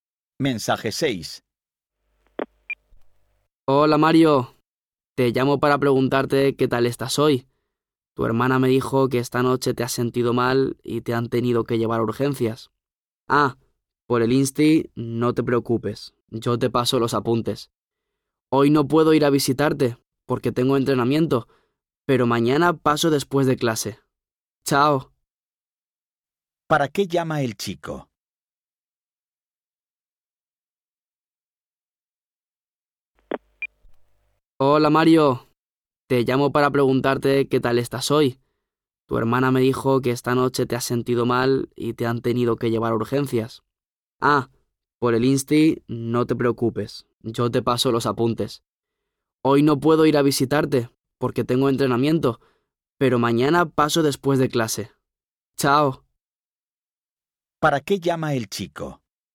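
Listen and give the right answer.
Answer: Para preguntarle a Mario cómo está.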